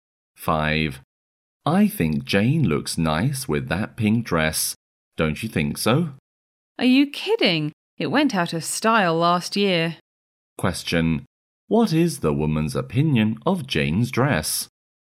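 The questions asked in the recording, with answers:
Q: what is the woman's opinion of Jane's dress?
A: It is out of style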